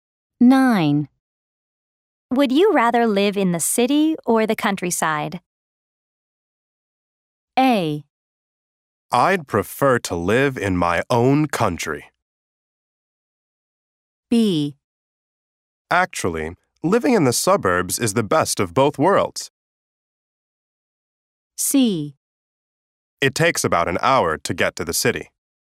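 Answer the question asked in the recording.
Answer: B: Actually, living in the suburbs is the best of both worlds.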